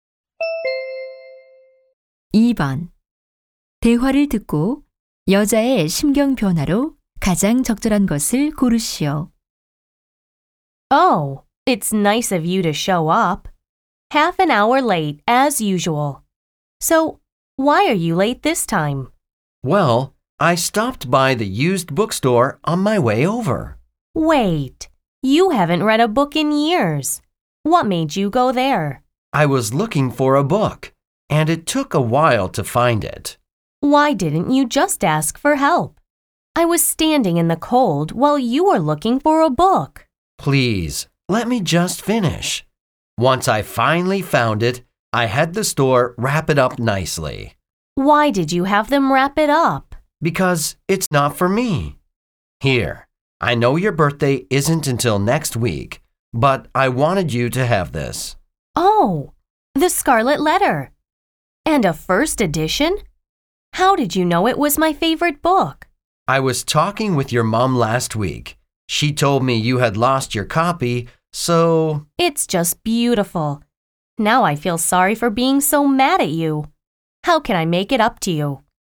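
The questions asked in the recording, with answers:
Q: 대화를 듣고 여자의 심경 변화로 가장 적절한 것을 고르시오.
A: 짜증남 → 고마움과 미안함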